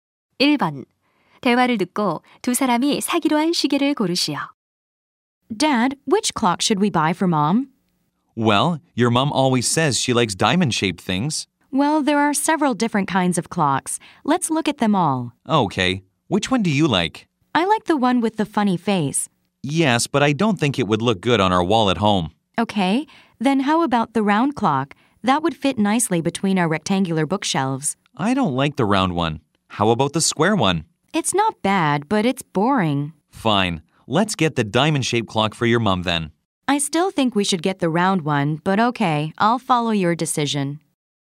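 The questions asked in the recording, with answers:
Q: 대화를 듣고 두 사람이 사기로 한 시계를 고르시오.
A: 다이아몬드 모양 시계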